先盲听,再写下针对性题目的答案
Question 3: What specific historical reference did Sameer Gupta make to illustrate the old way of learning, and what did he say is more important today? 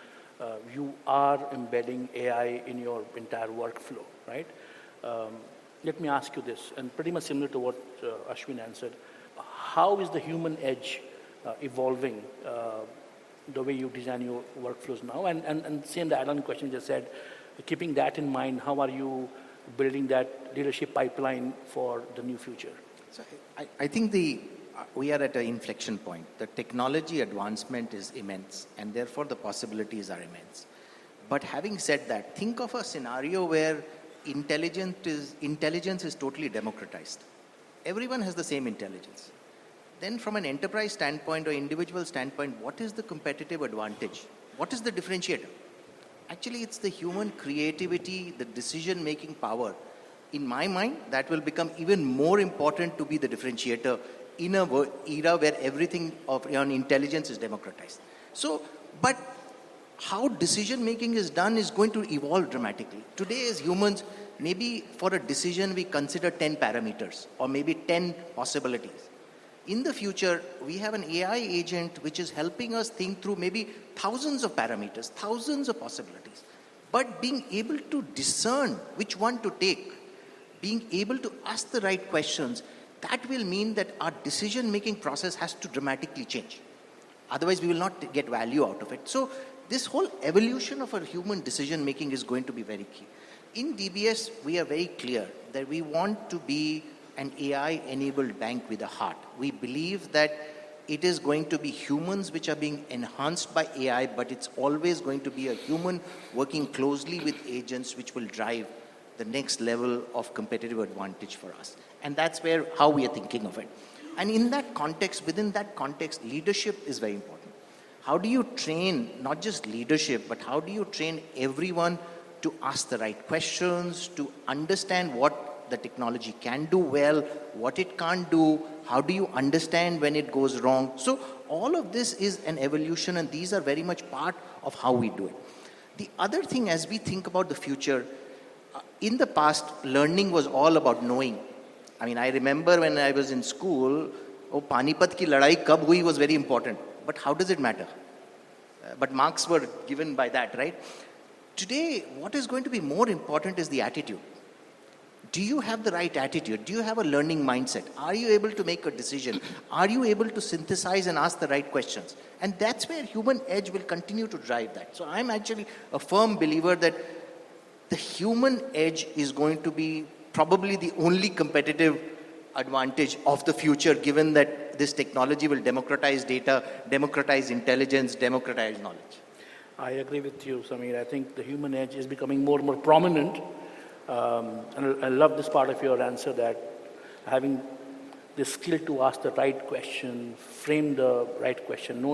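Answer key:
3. When the Battle of Panipat happened ("Panipat ki ladai kab hui"); today attitude and a learning mindset matter more.

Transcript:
For the young people, also we have to bring in emotional maturity. Uh that, you know, you can train on context, you can understand supply chain, you can
understand marketing, you can understand AI agents very quickly. But, how do you then bring in uh enough of that uh you know, uh emotional quotient so that because when you, you know, do some of this work in need to bring in the human element into your thinking as well. Thank Ashwin. Uh Samir, as a leader and a as an executive in a in a global bank, I'm I'm uh you are embedding AI in your entire workflow, right? Um workflow, right? Um let me ask you this
and pretty much similar to what uh Ashwin answered. How is the human edge uh evolving uh the way you design your workflows now? And and and same the add-on question you said, keeping that in mind, how are you building that leadership pipeline for the new future? 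So, I I think the we are at an inflection point. The technology advancement is immense and therefore the possibilities are immense. But, having said that, think of a scenario where intelligent is intelligence is totally democratized. Everyone has the same intelligence.
Then, from an enterprise standpoint or individual standpoint, what is the competitive advantage? What is the differentiator? differentiator? Actually, it's the human creativity, the decision-making power. In my mind, that will become even more important to be the differentiator in a era where everything of your intelligence is democratized. So, but democratized. So, but how decision-making is done is going to evolve dramatically. Today, as humans, maybe for a decision we consider 10 parameters or maybe 10 possibilities. In the future, we have an AI agent which is helping us
think through maybe thousands of parameters, thousands of possibilities. 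But, being able to discern which one to take, being able to ask the right questions, that will mean that our decision-making process has to dramatically change. Otherwise, we will not get value out of it. So, this whole evolution of our human decision-making is going to be very key. In DBS, we are very clear that we want to be an AI-enabled bank with a heart. We believe that it is going to be humans which are being enhanced by
AI, but it's always going to be a human working closely with agents which will drive the next level of competitive advantage for us. And that's where how we are thinking of it. And in that context, within that context, leadership is very important. How do you train, not just leadership, but how do you train everyone to ask the right questions, to understand what the technology can do well, what it can't do, how do you understand when it goes wrong? So, all of this is an evolution and
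these are very much part of how we do it. The other thing as we think about the future, future, in the past, learning was all about knowing. I mean, I remember when I was in school, oh, Panipat ki ladai kab hui was very important, but how does it matter? matter? Uh, but marks were given by that, right? >> [snorts] >> [snorts] >> Today, what is going to be more important is the attitude. Do you have the right attitude? Do you have a learning mindset? Are you
able to make a decision? Are you able to synthesize and ask the right questions? And that's where human edge will continue to drive that. So, I'm actually a firm believer that the human edge is going to be probably the only competitive advantage of the future given that this technology will democratize data, democratize democratize data, democratize intelligence, democratize knowledge. I agree with you, Samir. I think the human edge is becoming more and more prominent. 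Um I I love this part of your answer that having answer that
having the skill to ask the right question, frame the right question, know the

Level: CEFRC1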